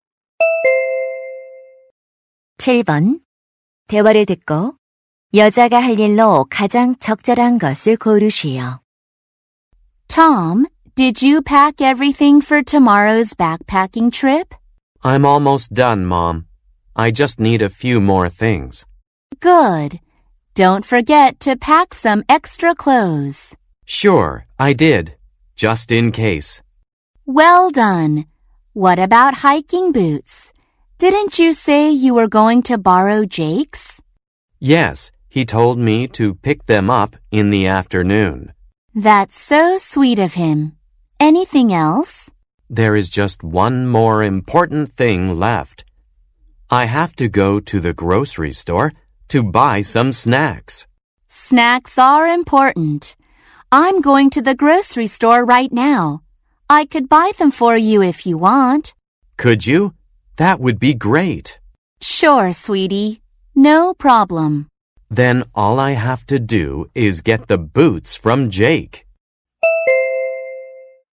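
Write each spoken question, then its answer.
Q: 대화를 듣고 여자가 할 일로 가장 적절한 것을 고르시오.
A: 간식 사 오기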